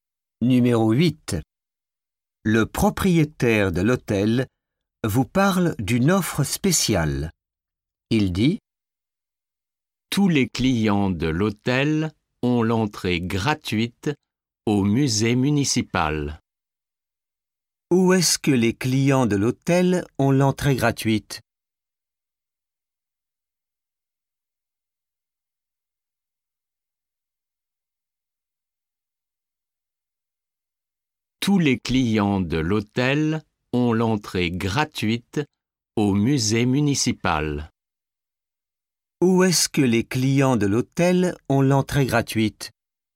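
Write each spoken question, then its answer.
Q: Où est-ce que les clients de l'hôtel ont l'entrée gratuite ?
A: Au musée municipal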